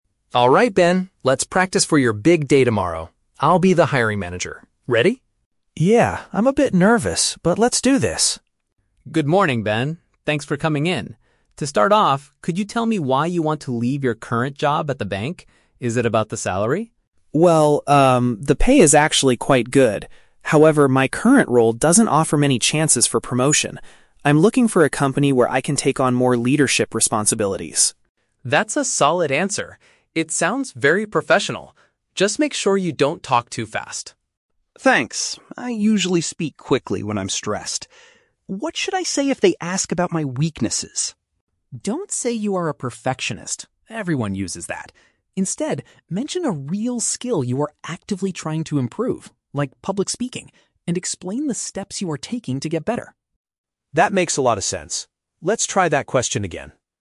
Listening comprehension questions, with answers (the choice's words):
Listen to the conversation between two roommates practicing for an interview. Choose the best answer (A, B, or C) for each question below.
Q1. Why does Ben want to change his job?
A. He is unsatisfied with his current monthly salary.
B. He wants a position with better career advancement.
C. He dislikes his current coworkers and manager.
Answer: He wants a position with better career advancement.

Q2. What advice does Ryan give to Ben regarding his speaking style?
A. He needs to reduce his speaking speed.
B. He should try to speak much louder.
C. He should use more professional vocabulary.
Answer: He needs to reduce his speaking speed.

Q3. What does Ryan suggest Ben do when discussing his weaknesses?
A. Claim that he has a tendency to be a perfectionist.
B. Change the subject quickly to focus on his strengths.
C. Focus on a genuine skill he is working to develop.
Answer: Focus on a genuine skill he is working to develop.

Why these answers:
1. Ben says that his current role "doesn't offer many chances for promotion" and he wants to take on "more leadership responsibilities." Paraphrasing: chances for promotion = career advancement.
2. Ryan tells Ben, "Just make sure you don't talk too fast." Paraphrasing: don't talk too fast = reduce his speaking speed.
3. Ryan advises Ben to "mention a real skill you are actively trying to improve." Paraphrasing: real skill = genuine skill; trying to improve = working to develop.

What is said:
Ryan: Alright Ben, let's practice for your big day tomorrow. I'll be the hiring manager. Ready?
Ben: Yeah, I'm a bit nervous, but let's do this.
Ryan: Good morning, Ben. Thanks for coming in. To start off, could you tell me why you want to leave your current job at the bank? Is it about the salary?
Ben: Well, um, the pay is actually quite good. However, my current role doesn't offer many chances for promotion. I'm looking for a company where I can take on more leadership responsibilities.
Ryan: That's a solid answer! It sounds very professional. Just make sure you don't talk too fast.
Ben: Thanks. I usually speak quickly when I'm stressed. What should I say if they ask about my weaknesses?
Ryan: Don't say you are a perfectionist; everyone uses that. Instead, mention a real skill you are actively trying to improve, like public speaking, and explain the steps you are taking to get better.